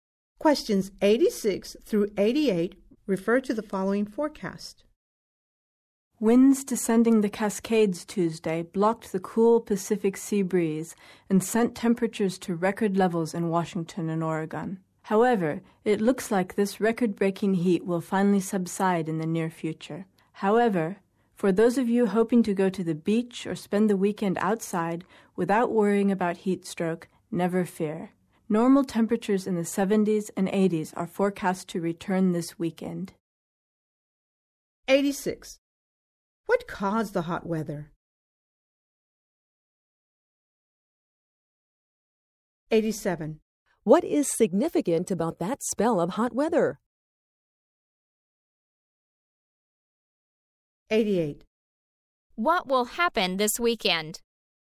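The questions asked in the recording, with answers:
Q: What caused the hot weather?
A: Winds descending the Cascades blocked the cool Pacific sea breeze

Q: What is significant about that spell of hot weather?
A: It set record temperatures

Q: What will happen this weekend?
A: Normal temperatures will return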